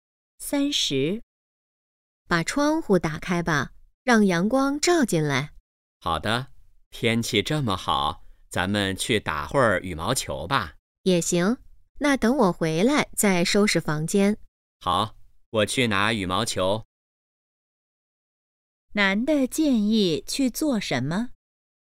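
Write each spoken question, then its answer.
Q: 男的建议去做什么?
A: 打羽毛球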